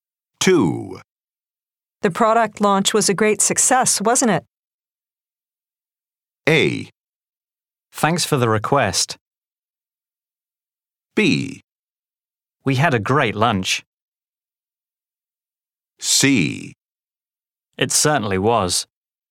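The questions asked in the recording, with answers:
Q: The product launch was a great success, wasn't it?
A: C: It certainly was.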